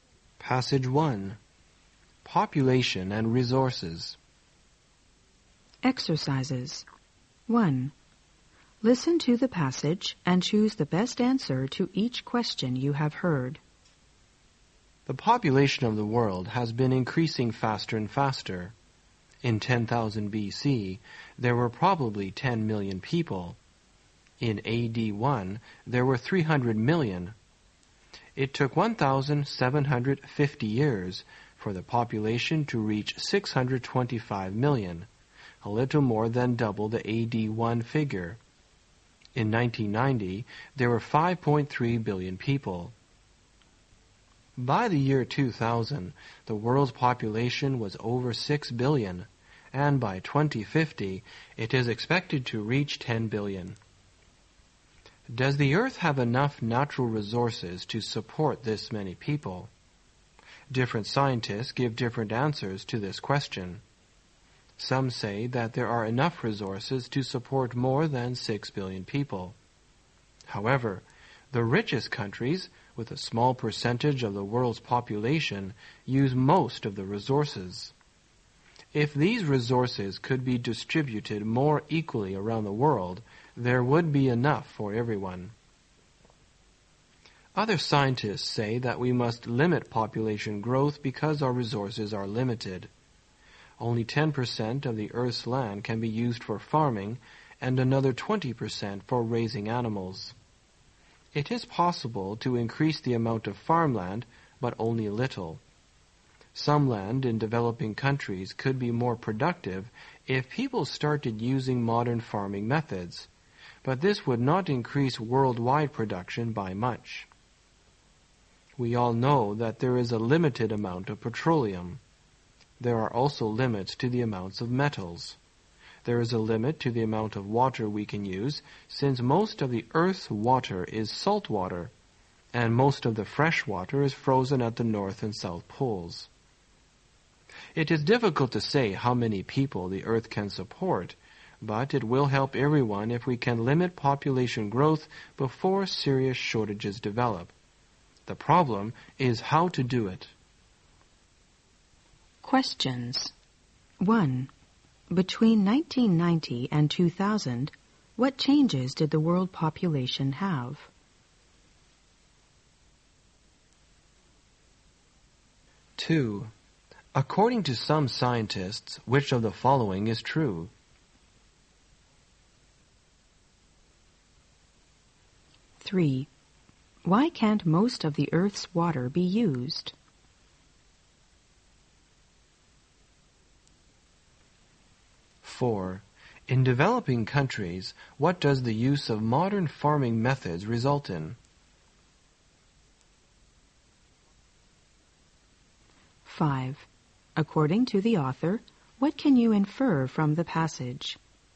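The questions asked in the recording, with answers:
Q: Between 1990 and 2000, what changes did the world population have?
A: It grew from 5.3 billion to over 6 billion.

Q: Why can't most of the Earth's water be used?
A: Most of it is salt water, and most fresh water is frozen at the poles.

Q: In developing countries, what does the use of modern farming methods result in?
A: Land becomes more productive, but worldwide production does not increase by much.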